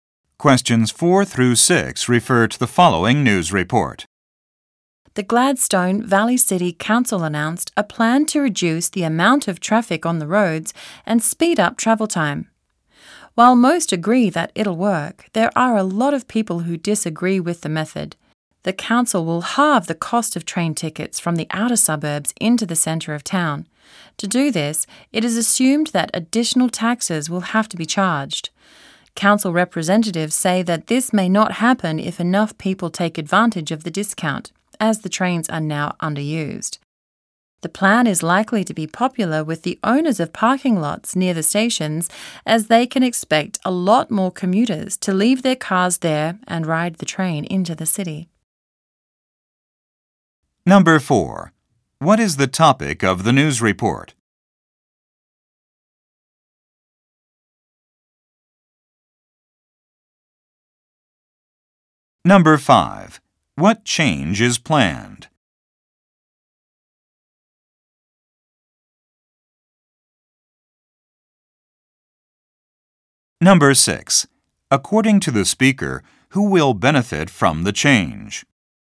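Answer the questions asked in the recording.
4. A plan to reduce traffic
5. Train tickets from the suburbs will be half price
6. Owners of parking lots near the stations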